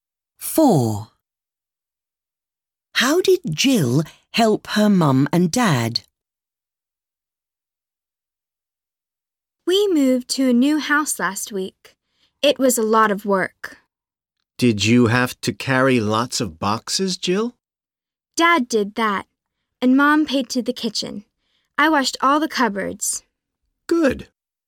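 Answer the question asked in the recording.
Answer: She washed all the cupboards.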